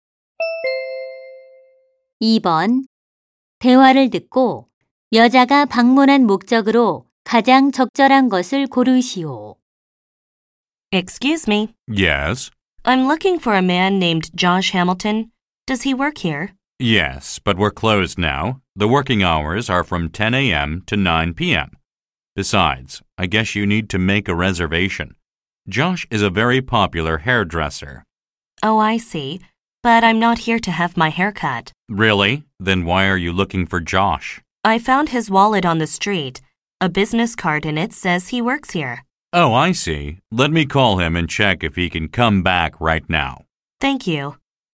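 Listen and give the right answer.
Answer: 주운 지갑을 돌려주려고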